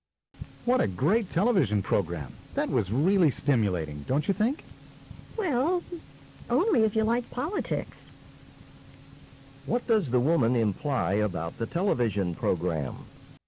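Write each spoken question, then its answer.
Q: What does the woman imply about the television program?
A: She found it interesting only for people who like politics; she didn't find it stimulating.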